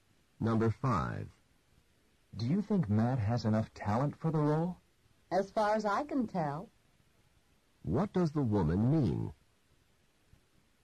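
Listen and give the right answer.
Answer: She thinks Matt has enough talent, but isn't sure.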